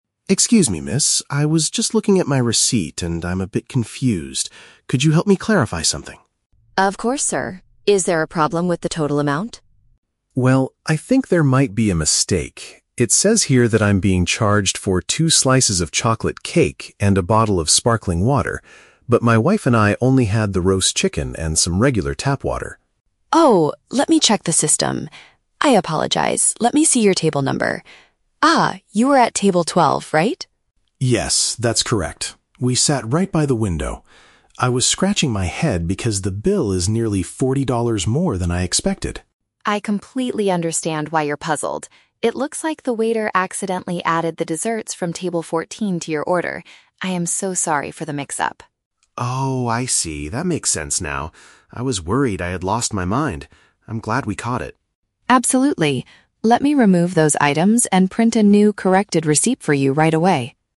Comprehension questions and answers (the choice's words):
Listen to the conversation between a customer and a restaurant cashier. Choose the correct answer (A, B, or C) for each question.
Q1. Why is the customer feeling confused?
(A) He does not understand why the restaurant's prices are so high.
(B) He was asked to pay for food and drinks he did not consume.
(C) He cannot read the total amount printed on the receipt.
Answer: He was asked to pay for food and drinks he did not consume.

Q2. What did the customer and his wife actually eat at the restaurant?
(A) Two slices of chocolate cake.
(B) A bottle of sparkling water.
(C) A meal of roasted meat and tap water.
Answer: A meal of roasted meat and tap water.

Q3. How does the cashier explain the situation?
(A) The staff made an error regarding the table numbers.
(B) The computer system broke down earlier that day.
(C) The customer sat at the wrong table by the window.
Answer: The staff made an error regarding the table numbers.

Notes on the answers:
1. The Key: The customer says he is "being charged for two slices of chocolate cake and a bottle of sparkling water" but they "only had the roast chicken". This means he is being asked to pay for things he didn't eat (consume). The Trap (A): He mentions the bill is "forty dollars more than I expected," but this is because of the extra items, not because the restaurant's general prices are too high. The Trap (C): He clearly states the bill is forty dollars more, which means he can read the numbers perfectly fine.
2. The Key: The customer says, "my wife and I only had the roast chicken and some regular tap water." "Roast chicken" is paraphrased as "roasted meat." The Trap (A) & (B): Both the chocolate cake and sparkling water are mentioned in the audio, but these were the items he was wrongly charged for, not what he actually ate.
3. The Key: The cashier explains that "the waiter accidentally added the desserts from table 14 to your order." This means the staff mixed up the table numbers. The Plausible (B): The cashier says "let me check the system," but she never says the system is broken; she uses it to find the staff's mistake. The Trap (C): The customer did sit by the window at Table 12, but this was the correct table, not the wrong one.

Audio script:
Customer: Excuse me, miss. I was just looking at my receipt, and I'm a bit confused. Could you help me clarify something?
Cashier: Of course, sir. Is there a problem with the total amount?
Customer: Well, I think there might be a mistake. It says here that I'm being charged for two slices of chocolate cake and a bottle of sparkling water. But my wife and I only had the roast chicken and some regular tap water.
Cashier: Oh, let me check the system. I apologize, let me see your table number. Ah, you were at table 12, right?
Customer: Yes, that's correct. We sat right by the window. I was scratching my head because the bill is nearly forty dollars more than I expected.
Cashier: I completely understand why you're puzzled. It looks like the waiter accidentally added the desserts from table 14 to your order. I am so sorry for the mix-up.
Customer: Oh, I see. That makes sense now. I was worried I had lost my mind! I'm glad we caught it.
Cashier: Absolutely. Let me remove those items and print a new, corrected receipt for you right away.